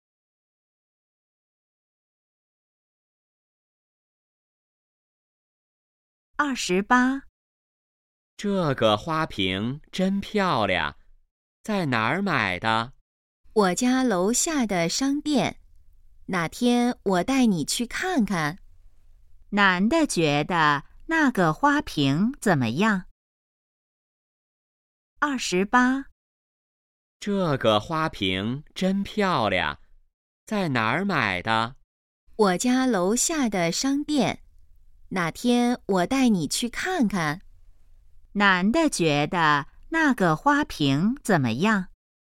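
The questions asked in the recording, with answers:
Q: 男的觉得那个花瓶怎么样?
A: 很漂亮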